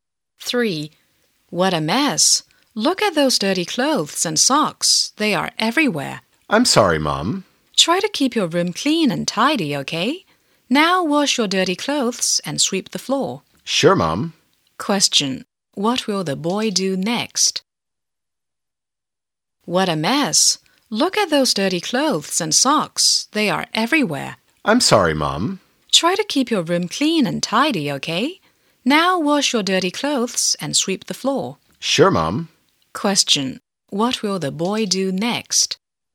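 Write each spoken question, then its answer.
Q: What will the boy do next?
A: Wash his dirty clothes and sweep the floor.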